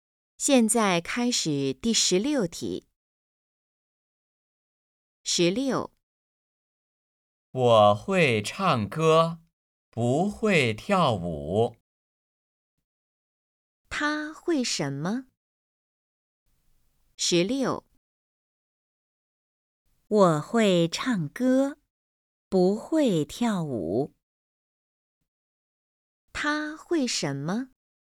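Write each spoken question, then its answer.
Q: 他会什么?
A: 唱歌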